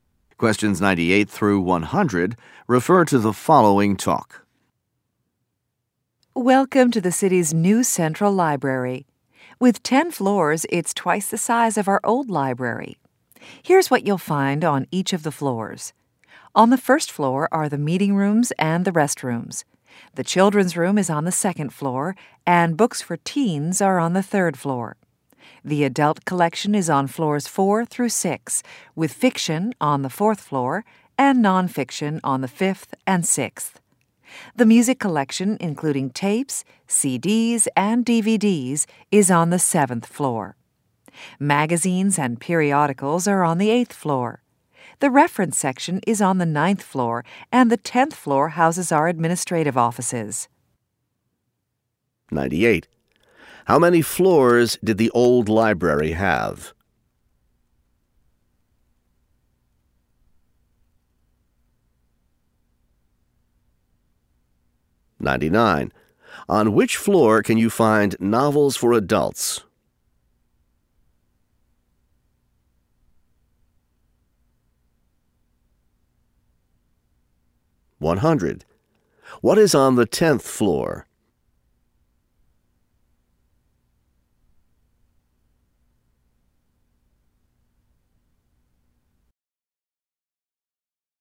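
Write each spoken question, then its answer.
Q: On which floor can you find novels for adults?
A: The fourth floor

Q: What is on the 10th floor?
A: Administrative offices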